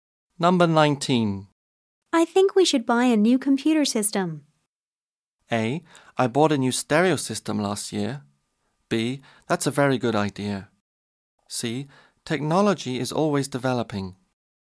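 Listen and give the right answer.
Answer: B: That's a very good idea.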